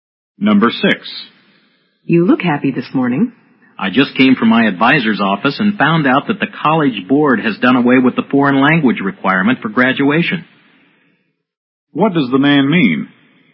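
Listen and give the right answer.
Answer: The foreign language requirement for graduation has been removed.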